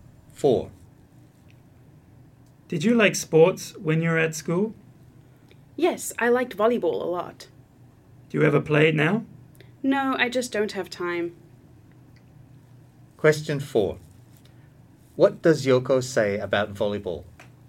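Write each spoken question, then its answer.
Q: What does Yoko say about volleyball?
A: She liked it a lot at school but has no time to play it now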